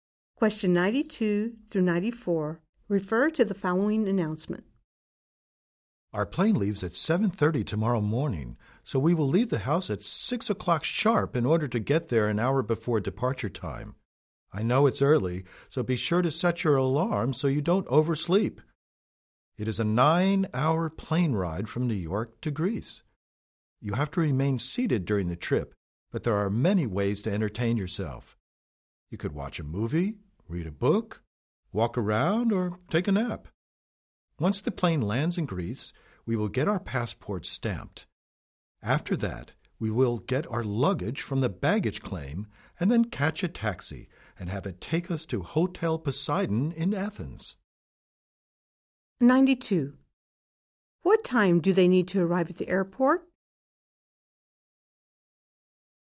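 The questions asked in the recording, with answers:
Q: What time do they need to arrive at the airport?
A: 6:30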